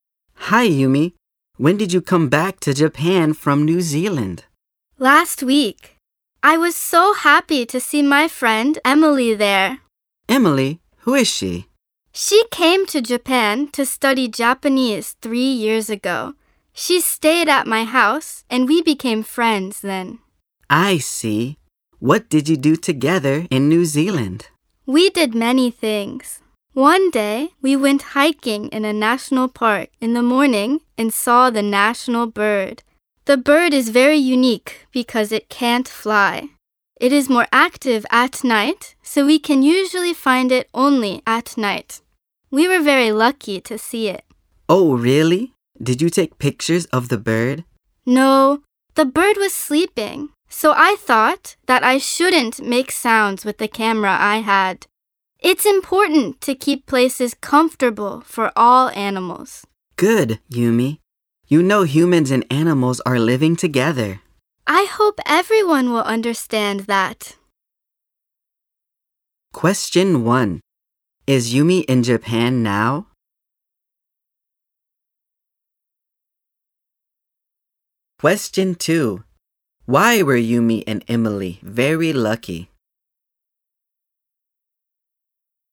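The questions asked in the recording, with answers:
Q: Is Yumi in Japan now?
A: Yes, she is.

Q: Why were Yumi and Emily very lucky?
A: Because they saw the national bird in the morning, though it is usually found only at night.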